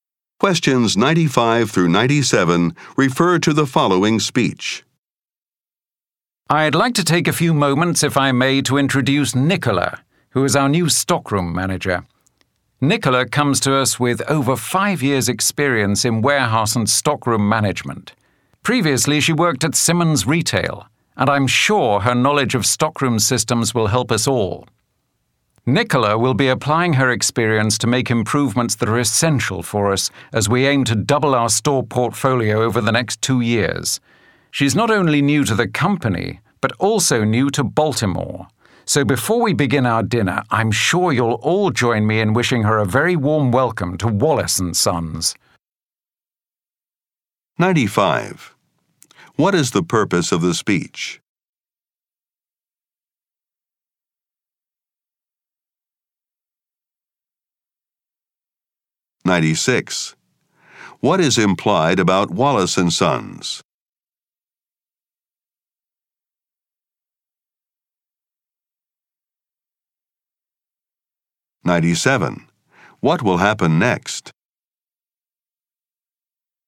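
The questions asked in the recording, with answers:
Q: What is the purpose of the speech?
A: To introduce a new stockroom manager

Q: What is implied about Wallace and Sons?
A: It plans to double its number of stores in the next 2 years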